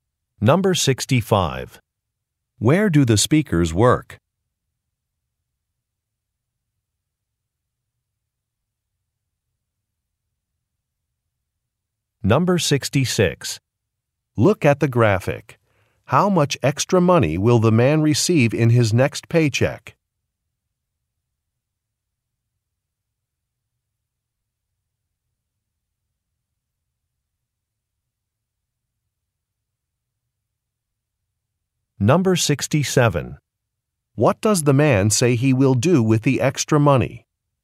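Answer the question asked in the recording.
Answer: Upgrade his phone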